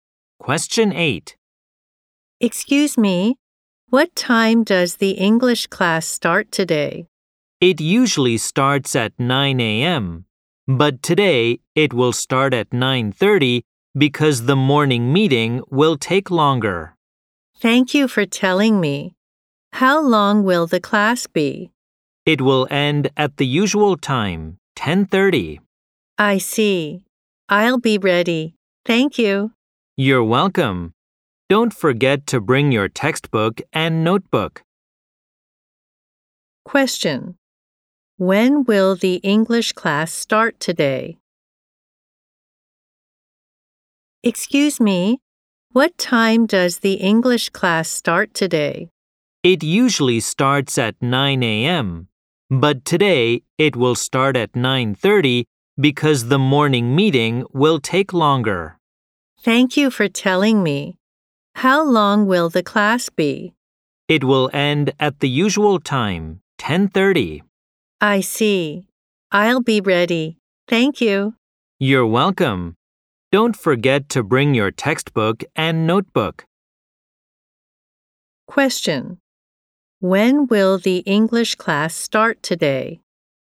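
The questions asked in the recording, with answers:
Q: When will the English class start today?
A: At 9:30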